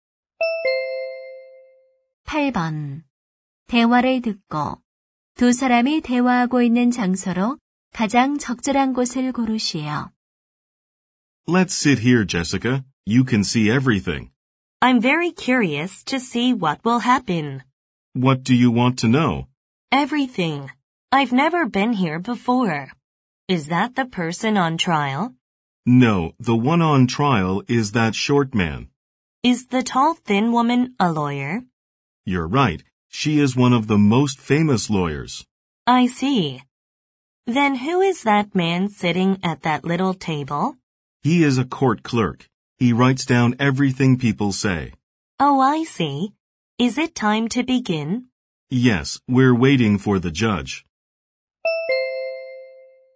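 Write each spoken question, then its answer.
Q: 대화를 듣고 두 사람이 대화하고 있는 장소로 가장 적절한 곳을 고르시오.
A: 법정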